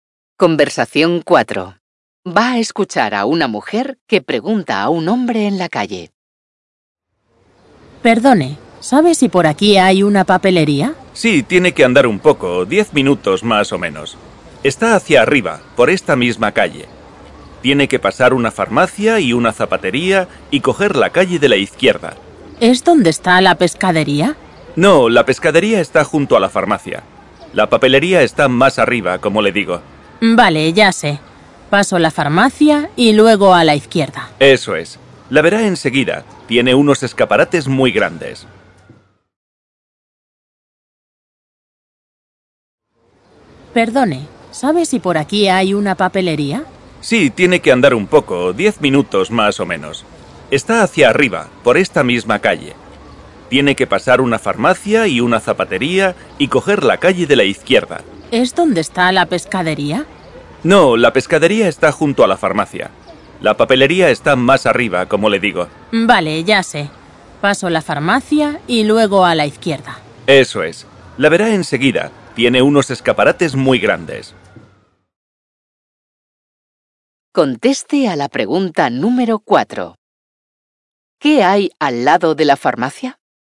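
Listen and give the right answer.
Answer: Una pescadería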